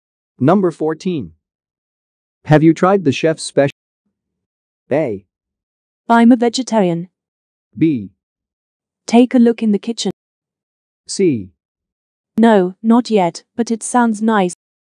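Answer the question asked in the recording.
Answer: C: No, not yet, but it sounds nice.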